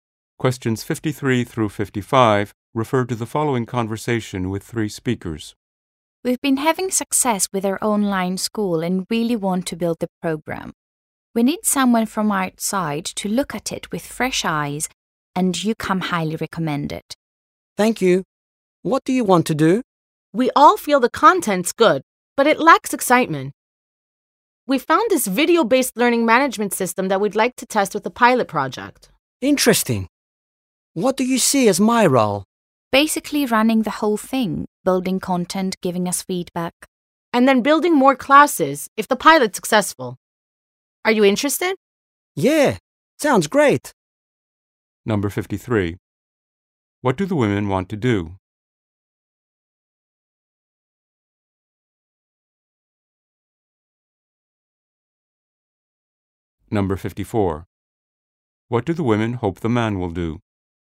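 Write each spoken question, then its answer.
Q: What do the women want to do?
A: Test a video-based learning system with a pilot project

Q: What do the women hope the man will do?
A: Run the pilot project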